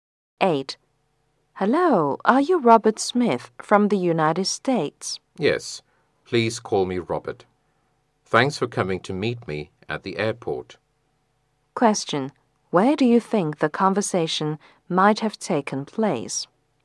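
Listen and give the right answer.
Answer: At the airport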